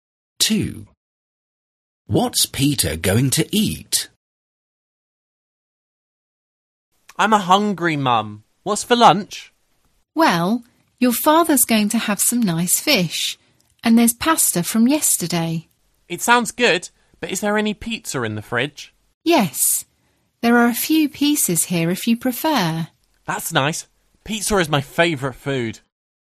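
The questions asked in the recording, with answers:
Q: What's Peter going to eat?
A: pizza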